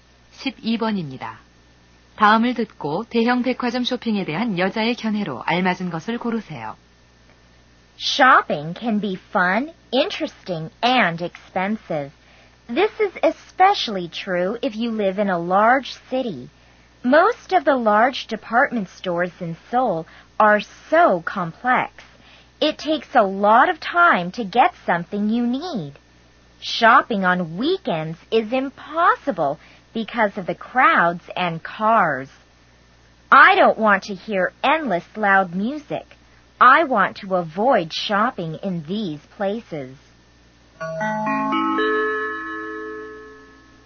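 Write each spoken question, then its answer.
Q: 다음을 듣고 대형 백화점 쇼핑에 대한 여자의 견해로 알맞은 것을 고르세요.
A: 대형 백화점 쇼핑을 피하고 싶다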